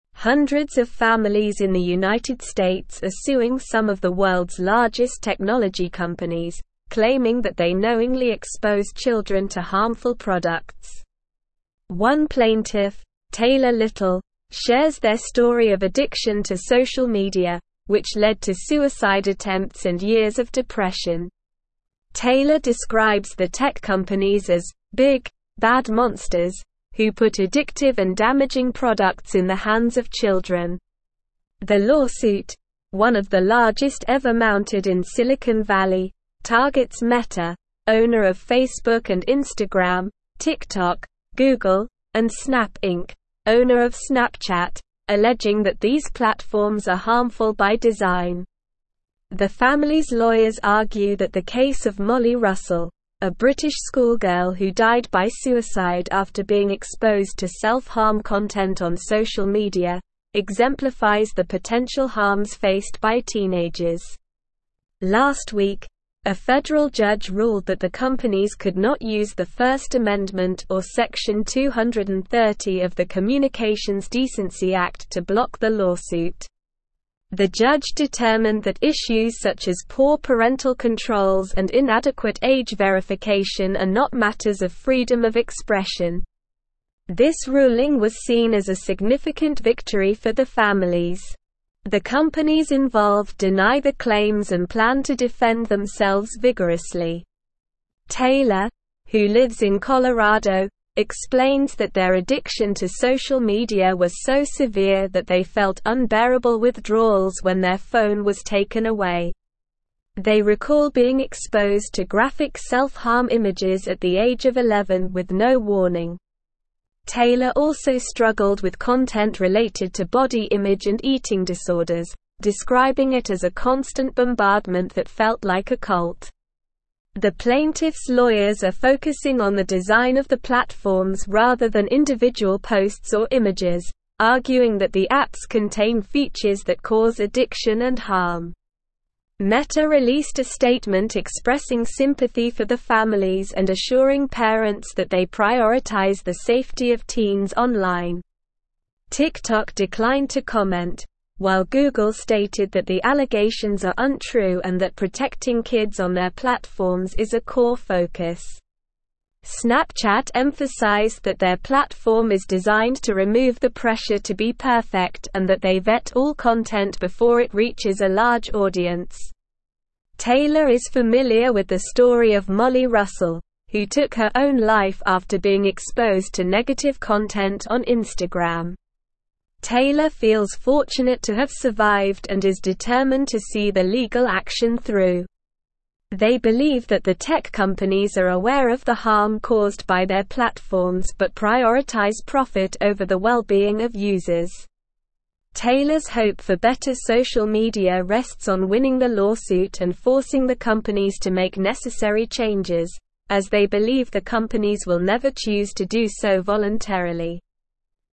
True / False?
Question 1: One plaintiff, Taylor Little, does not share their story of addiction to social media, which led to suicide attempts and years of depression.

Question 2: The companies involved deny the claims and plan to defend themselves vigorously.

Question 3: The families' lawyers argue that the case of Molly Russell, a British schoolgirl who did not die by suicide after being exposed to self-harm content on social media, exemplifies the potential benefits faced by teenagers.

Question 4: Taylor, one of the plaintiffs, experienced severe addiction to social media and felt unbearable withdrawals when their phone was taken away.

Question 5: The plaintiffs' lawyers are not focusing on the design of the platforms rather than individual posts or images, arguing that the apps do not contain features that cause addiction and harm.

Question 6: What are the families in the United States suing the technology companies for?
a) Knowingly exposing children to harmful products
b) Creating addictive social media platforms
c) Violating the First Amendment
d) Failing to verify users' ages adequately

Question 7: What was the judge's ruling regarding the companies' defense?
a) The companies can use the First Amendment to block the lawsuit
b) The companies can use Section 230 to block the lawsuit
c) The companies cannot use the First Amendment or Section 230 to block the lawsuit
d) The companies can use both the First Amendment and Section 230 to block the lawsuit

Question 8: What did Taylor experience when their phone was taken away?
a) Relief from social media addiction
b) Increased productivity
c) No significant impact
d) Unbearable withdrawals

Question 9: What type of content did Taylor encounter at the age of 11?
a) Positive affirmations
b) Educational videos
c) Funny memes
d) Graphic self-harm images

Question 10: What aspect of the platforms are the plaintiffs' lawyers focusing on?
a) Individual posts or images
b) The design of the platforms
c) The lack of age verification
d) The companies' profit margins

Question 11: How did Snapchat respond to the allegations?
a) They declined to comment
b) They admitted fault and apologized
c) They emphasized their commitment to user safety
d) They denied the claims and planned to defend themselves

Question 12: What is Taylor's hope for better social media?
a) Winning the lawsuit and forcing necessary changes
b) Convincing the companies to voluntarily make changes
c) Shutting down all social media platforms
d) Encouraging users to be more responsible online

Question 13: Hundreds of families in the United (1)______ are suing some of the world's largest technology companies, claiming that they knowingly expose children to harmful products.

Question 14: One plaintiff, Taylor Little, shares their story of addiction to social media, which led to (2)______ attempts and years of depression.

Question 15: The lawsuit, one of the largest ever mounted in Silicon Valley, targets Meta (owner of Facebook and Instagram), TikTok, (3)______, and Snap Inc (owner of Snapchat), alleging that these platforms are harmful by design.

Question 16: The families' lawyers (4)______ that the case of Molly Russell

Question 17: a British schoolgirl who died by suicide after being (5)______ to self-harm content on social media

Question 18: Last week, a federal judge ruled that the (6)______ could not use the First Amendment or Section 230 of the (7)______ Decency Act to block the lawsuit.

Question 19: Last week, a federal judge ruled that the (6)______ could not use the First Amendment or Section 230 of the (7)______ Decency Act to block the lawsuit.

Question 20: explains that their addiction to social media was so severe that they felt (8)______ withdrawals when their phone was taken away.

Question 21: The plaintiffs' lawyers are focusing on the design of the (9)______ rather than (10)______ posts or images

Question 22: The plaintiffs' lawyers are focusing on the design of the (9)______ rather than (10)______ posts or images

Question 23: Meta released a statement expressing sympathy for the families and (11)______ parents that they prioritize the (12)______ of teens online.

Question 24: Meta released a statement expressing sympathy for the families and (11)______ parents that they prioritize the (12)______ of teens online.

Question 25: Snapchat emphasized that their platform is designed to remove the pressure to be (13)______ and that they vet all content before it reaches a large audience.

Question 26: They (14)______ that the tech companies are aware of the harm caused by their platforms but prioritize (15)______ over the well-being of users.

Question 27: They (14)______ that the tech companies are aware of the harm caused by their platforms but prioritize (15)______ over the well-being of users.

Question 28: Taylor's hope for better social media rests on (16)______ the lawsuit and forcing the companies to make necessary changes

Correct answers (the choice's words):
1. False
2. True
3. False
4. True
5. False
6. Knowingly exposing children to harmful products
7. The companies cannot use the First Amendment or Section 230 to block the lawsuit
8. Unbearable withdrawals
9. Graphic self-harm images
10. The design of the platforms
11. They emphasized their commitment to user safety
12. Winning the lawsuit and forcing necessary changes
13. States
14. suicide
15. Google
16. argue
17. exposed
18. companies
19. Communications
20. unbearable
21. platforms
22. individual
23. assuring
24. safety
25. perfect
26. believe
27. profit
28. winning

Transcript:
Hundreds of families in the United States are suing some of the world's largest technology companies, claiming that they knowingly expose children to harmful products. One plaintiff, Taylor Little, shares their story of addiction to social media, which led to suicide attempts and years of depression. Taylor describes the tech companies as "big, bad monsters" who put addictive and damaging products in the hands of children. The lawsuit, one of the largest ever mounted in Silicon Valley, targets Meta (owner of Facebook and Instagram), TikTok, Google, and Snap Inc (owner of Snapchat), alleging that these platforms are harmful by design. The families' lawyers argue that the case of Molly Russell, a British schoolgirl who died by suicide after being exposed to self-harm content on social media, exemplifies the potential harms faced by teenagers.
Last week, a federal judge ruled that the companies could not use the First Amendment or Section 230 of the Communications Decency Act to block the lawsuit. The judge determined that issues such as poor parental controls and inadequate age verification are not matters of freedom of expression. This ruling was seen as a significant victory for the families.
Taylor, who lives in Colorado, explains that their addiction to social media was so severe that they felt unbearable withdrawals when their phone was taken away. They recall being exposed to graphic self-harm images at the age of 11 with no warning. Taylor also struggled with content related to body image and eating disorders, describing it as a constant bombardment that felt like a cult. The plaintiffs' lawyers are focusing on the design of the platforms rather than individual posts or images, arguing that the apps contain features that cause addiction and harm.
Meta released a statement expressing sympathy for the families and assuring parents that they prioritize the safety of teens online. TikTok declined to comment, while Google stated that the allegations are untrue and that protecting kids on their platforms is a core focus. Snapchat emphasized that their platform is designed to remove the pressure to be perfect and that they vet all content before it reaches a large audience.
Taylor is familiar with the story of Molly Russell, who took her own life after being exposed to negative content on Instagram. Taylor feels fortunate to have survived and is determined to see the legal action through. They believe that the tech companies are aware of the harm caused by their platforms but prioritize profit over the well-being of users. Taylor's hope for better social media rests on winning the lawsuit and forcing the companies to make necessary changes, as they believe the companies will never choose to do so voluntarily.

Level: Level 4